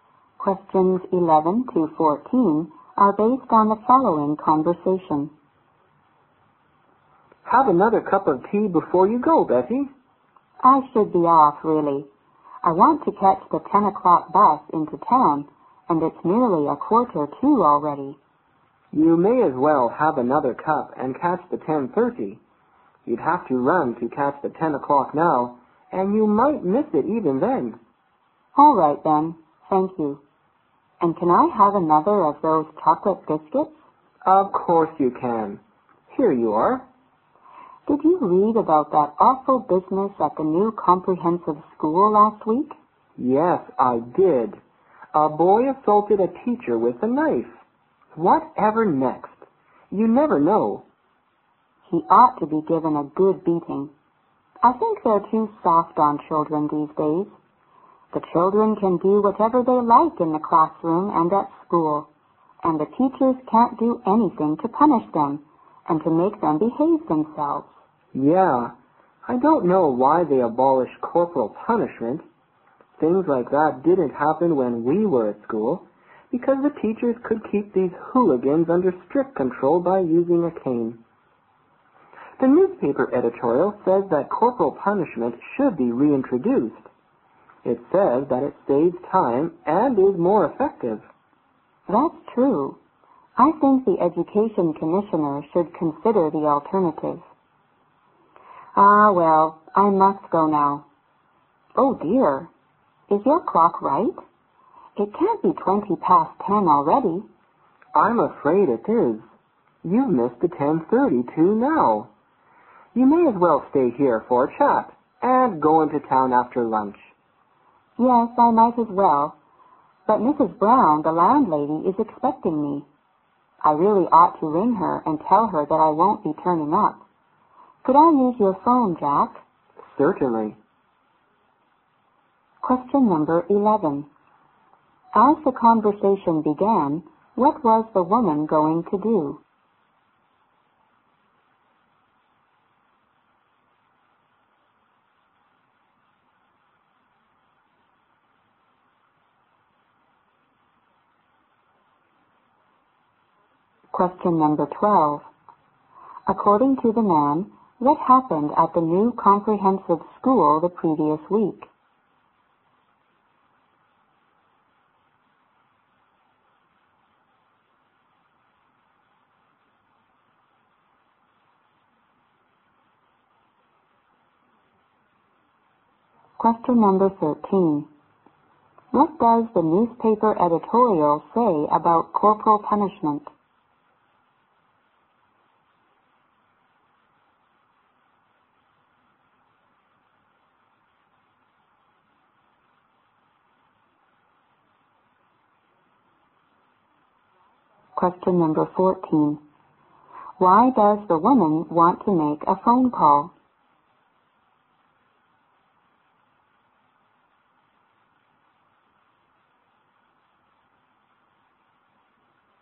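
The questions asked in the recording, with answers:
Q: As the conversation began, what was the woman going to do?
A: Catch the 10 o'clock bus into town

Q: According to the man, what happened at the new comprehensive school the previous week?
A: A boy assaulted a teacher with a knife

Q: What does the newspaper editorial say about corporal punishment?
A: It should be reintroduced because it saves time and is more effective

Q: Why does the woman want to make a phone call?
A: To tell her landlady Mrs. Brown that she won't be turning up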